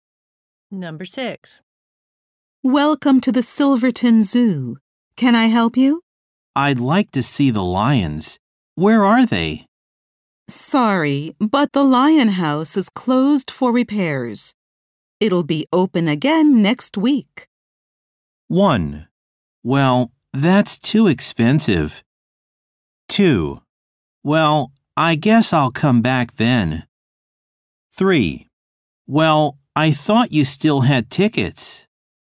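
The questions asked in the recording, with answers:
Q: It'll be open again next week.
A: 2: Well, I guess I'll come back then.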